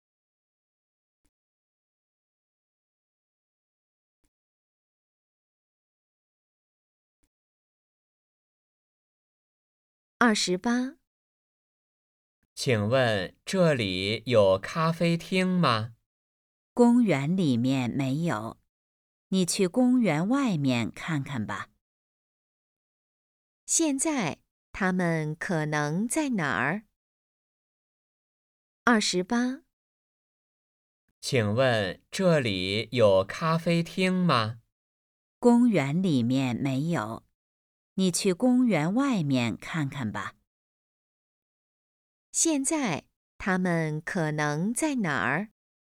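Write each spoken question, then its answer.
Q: 现在他们可能在哪儿?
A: 公园里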